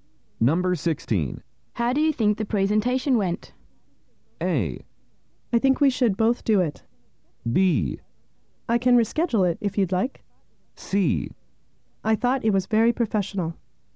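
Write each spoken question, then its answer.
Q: How do you think the presentation went?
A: C: I thought it was very professional.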